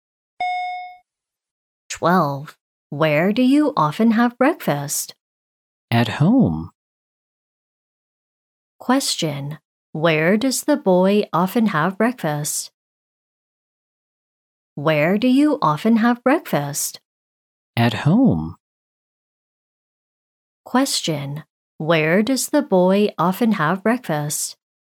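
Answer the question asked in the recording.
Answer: At home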